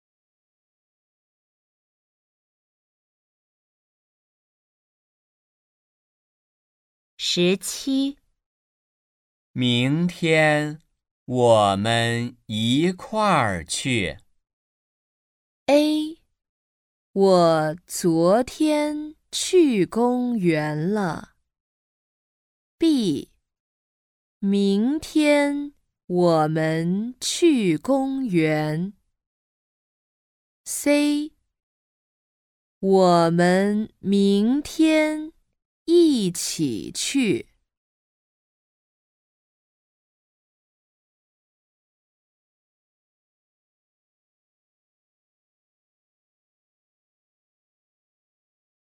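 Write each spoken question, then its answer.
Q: 明天我们一块儿去。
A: C: 我们明天一起去。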